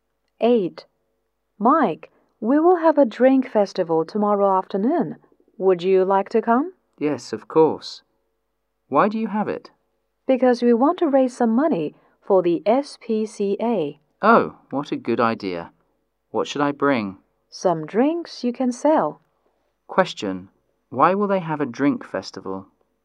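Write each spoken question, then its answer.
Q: Why will they have a drink festival?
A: To raise money for the SPCA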